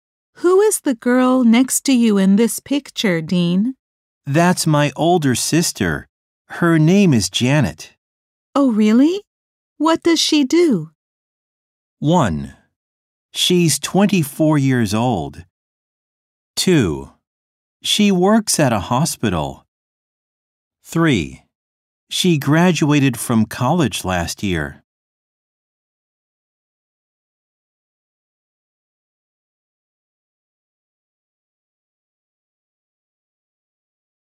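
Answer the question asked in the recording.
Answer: 2: She works at a hospital.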